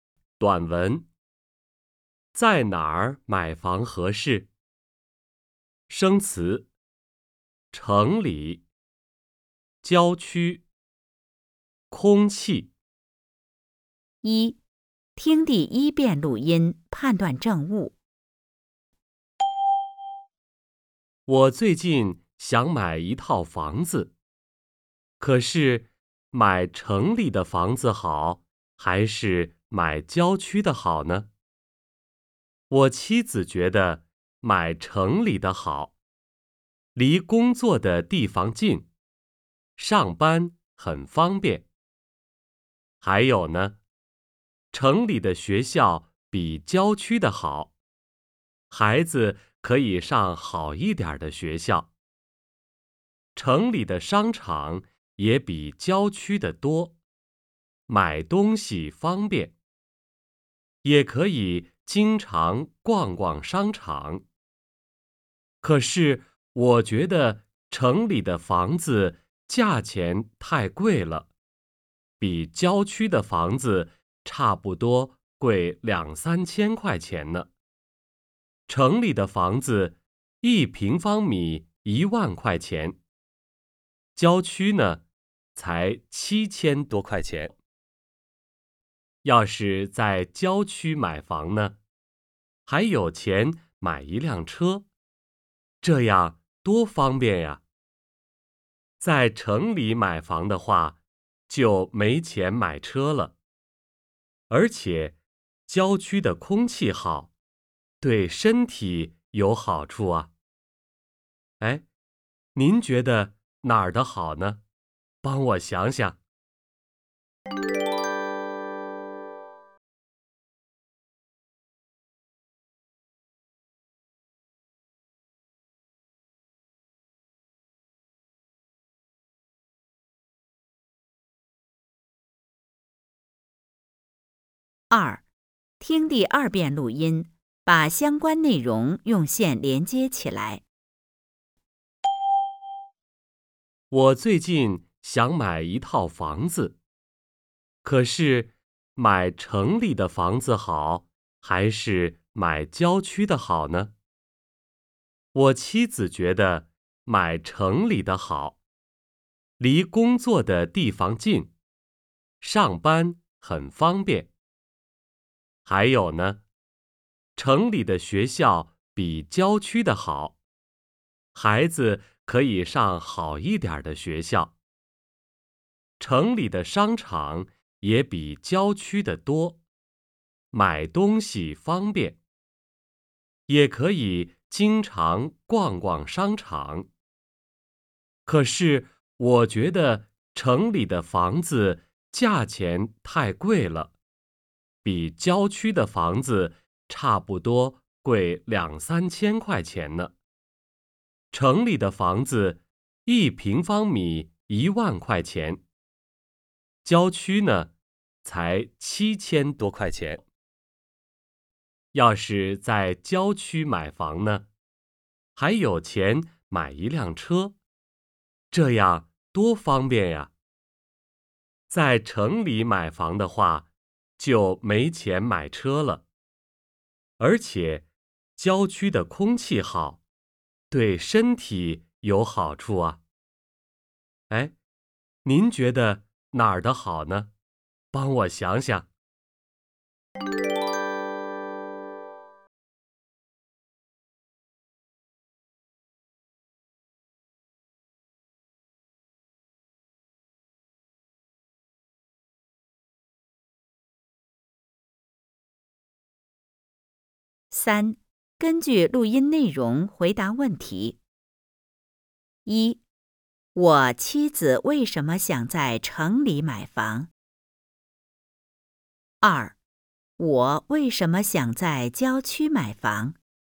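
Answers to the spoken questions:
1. 离工作的地方近,学校好,商场多,买东西方便
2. 房子便宜,还有钱买车,空气好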